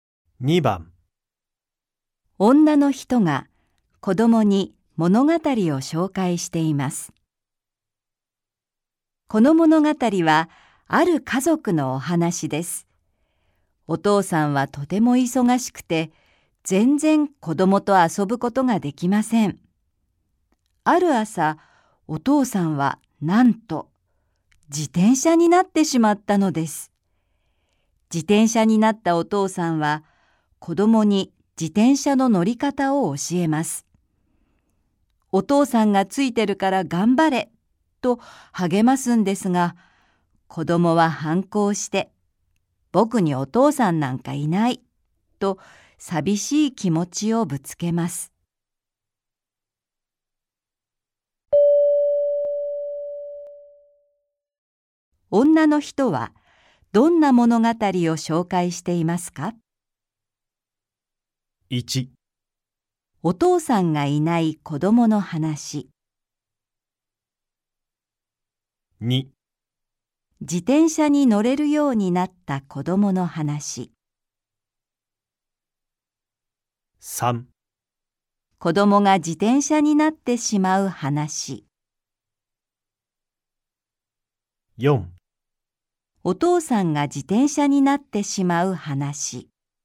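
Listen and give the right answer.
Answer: 4: お父さんが自転車になってしまう話。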